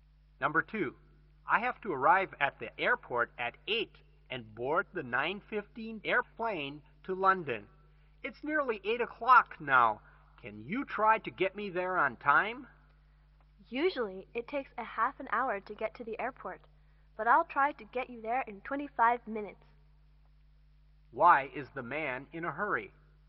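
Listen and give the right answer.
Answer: He must be at the airport by 8 to catch the 9:15 plane to London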